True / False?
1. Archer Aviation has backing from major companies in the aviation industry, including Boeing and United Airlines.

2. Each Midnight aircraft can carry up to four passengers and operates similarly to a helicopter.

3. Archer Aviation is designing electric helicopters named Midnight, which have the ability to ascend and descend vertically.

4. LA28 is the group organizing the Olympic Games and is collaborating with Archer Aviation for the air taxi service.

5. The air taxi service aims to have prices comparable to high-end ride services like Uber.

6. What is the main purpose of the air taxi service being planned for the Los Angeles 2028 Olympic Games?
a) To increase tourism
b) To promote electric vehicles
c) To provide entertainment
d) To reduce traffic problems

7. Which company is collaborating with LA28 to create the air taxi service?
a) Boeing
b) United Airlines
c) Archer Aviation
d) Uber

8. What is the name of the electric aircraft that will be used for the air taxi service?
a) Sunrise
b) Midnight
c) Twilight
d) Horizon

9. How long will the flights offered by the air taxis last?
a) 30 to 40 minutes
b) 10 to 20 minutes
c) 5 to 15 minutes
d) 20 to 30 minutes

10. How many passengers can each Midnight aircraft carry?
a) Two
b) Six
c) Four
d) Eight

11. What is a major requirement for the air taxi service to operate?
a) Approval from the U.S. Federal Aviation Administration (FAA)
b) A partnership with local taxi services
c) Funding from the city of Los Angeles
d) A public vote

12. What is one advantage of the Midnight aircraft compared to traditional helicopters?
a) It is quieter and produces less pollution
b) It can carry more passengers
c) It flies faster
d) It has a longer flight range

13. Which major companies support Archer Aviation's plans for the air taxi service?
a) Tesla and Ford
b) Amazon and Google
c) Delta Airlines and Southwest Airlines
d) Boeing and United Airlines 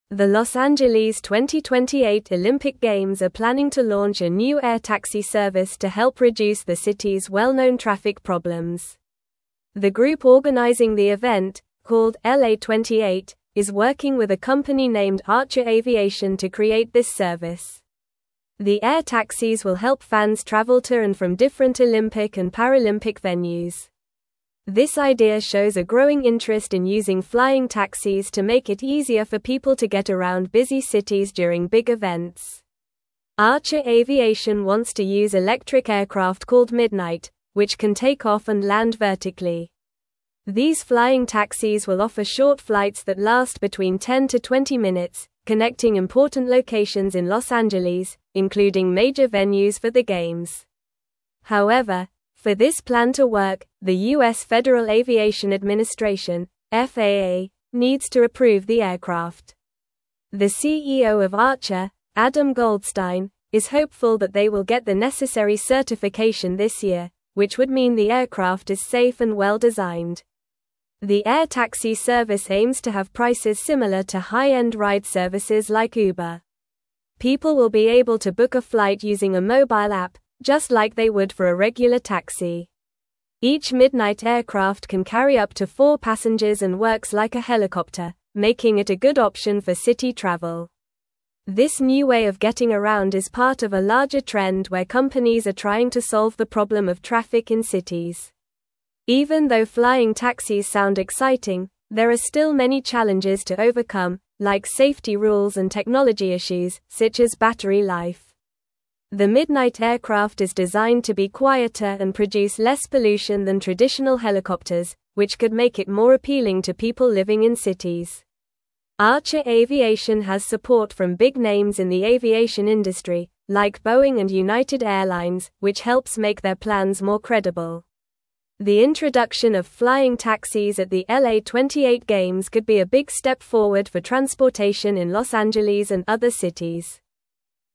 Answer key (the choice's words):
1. True
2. True
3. False
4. True
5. True
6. To reduce traffic problems
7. Archer Aviation
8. Midnight
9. 10 to 20 minutes
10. Four
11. Approval from the U.S. Federal Aviation Administration (FAA)
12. It is quieter and produces less pollution
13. Boeing and United Airlines

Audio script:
The Los Angeles 2028 Olympic Games are planning to launch a new air taxi service to help reduce the city's well-known traffic problems. The group organizing the event, called LA28, is working with a company named Archer Aviation to create this service. The air taxis will help fans travel to and from different Olympic and Paralympic venues. This idea shows a growing interest in using flying taxis to make it easier for people to get around busy cities during big events.
Archer Aviation wants to use electric aircraft called Midnight, which can take off and land vertically. These flying taxis will offer short flights that last between 10 to 20 minutes, connecting important locations in Los Angeles, including major venues for the Games. However, for this plan to work, the U.S. Federal Aviation Administration (FAA) needs to approve the aircraft. The CEO of Archer, Adam Goldstein, is hopeful that they will get the necessary certification this year, which would mean the aircraft is safe and well-designed.
The air taxi service aims to have prices similar to high-end ride services like Uber. People will be able to book a flight using a mobile app, just like they would for a regular taxi. Each Midnight aircraft can carry up to four passengers and works like a helicopter, making it a good option for city travel. This new way of getting around is part of a larger trend where companies are trying to solve the problem of traffic in cities.
Even though flying taxis sound exciting, there are still many challenges to overcome, like safety rules and technology issues, such as battery life. The Midnight aircraft is designed to be quieter and produce less pollution than traditional helicopters, which could make it more appealing to people living in cities. Archer Aviation has support from big names in the aviation industry, like Boeing and United Airlines, which helps make their plans more credible. The introduction of flying taxis at the LA28 Games could be a big step forward for transportation in Los Angeles and other cities.

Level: Level 3